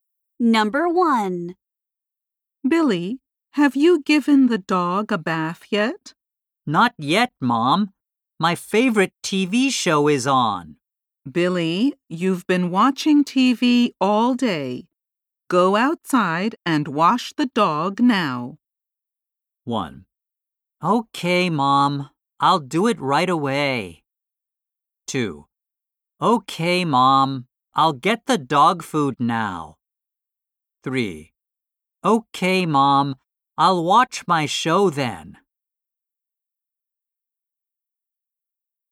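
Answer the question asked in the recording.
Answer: 1: Okay, Mom. I'll do it right away.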